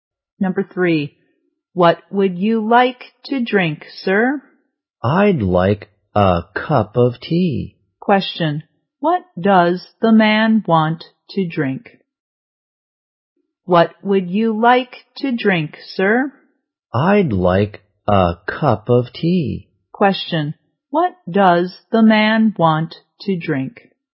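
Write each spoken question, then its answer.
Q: what does the man want to drink?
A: A cup of tea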